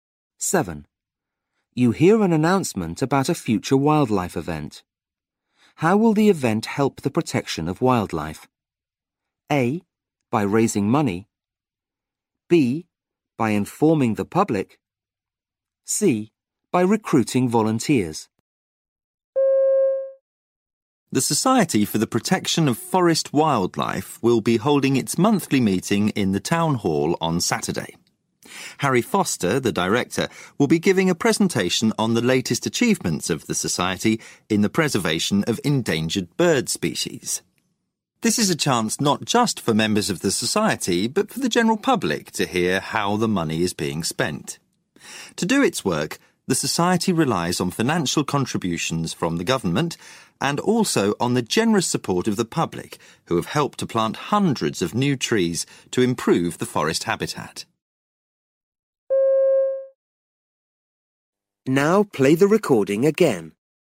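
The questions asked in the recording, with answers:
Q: How will the event help the protection of wildlife?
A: B: By informing the public.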